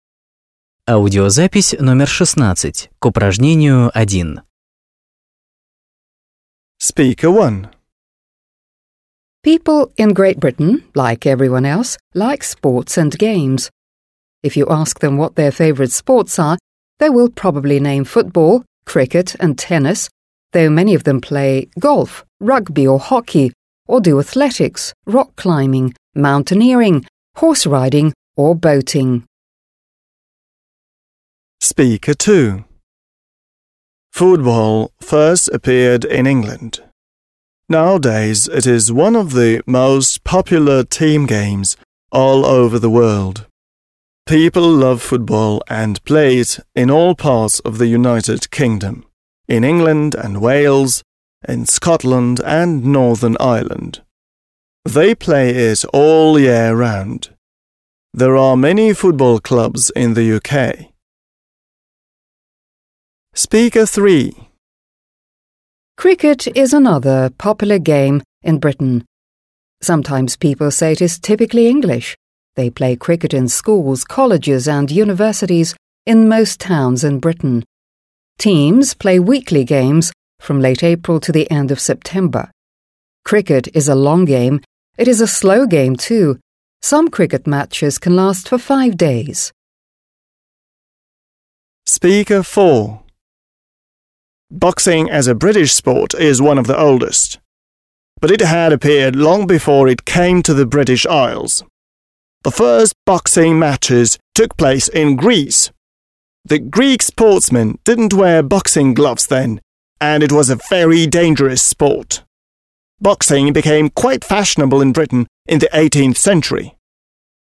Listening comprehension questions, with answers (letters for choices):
1. Listen, Audio (16), and match the titles (a-e) with the stories (1-4) the speakers tell. There is one title you don't have to use.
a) Popular Indoor Sport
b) Favourite Game of All Seasons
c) Mostly Summer Game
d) Sports Interests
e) Sport with an Ancient History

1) Speaker 1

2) Speaker 2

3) Speaker 3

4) Speaker 4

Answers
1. d
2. b
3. c
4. e

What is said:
People in Great Britain like everyone else like sports and games. If you ask them what their favourite sports are they will probably name football, cricket and tennis. There are many of them play golf, rugby of hockey, or do athletics, rock climbing, mountaineering, horse riding or boating.
Football first appeared in England. Nowadays it is one of the most popular team games all over the world. People love football and play in all part of the United Kingdom − in England and Wales, in Scotland and Northern Ireland. They play it all year round. There are many football clubs in the UK.
Cricket is another popular game in Britain. Sometimes people say it's typically English. They play cricket in schools, colleges and universities in most towns in Britain. Teams play weekly games from late April till the end of September. Cricket is a long game, it is a slow game too. Some cricket matches can last for five days.
Boxing as a British sport is one of the oldest. But it had appeared long before it came to the British Isles. The first boxing matches took place in Greece. The Greek sportsmen didn't wear boxing gloves then, and it was a very dangerous sport. Boxing became quite fashionable in Britain in the 18th century.

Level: 8 класс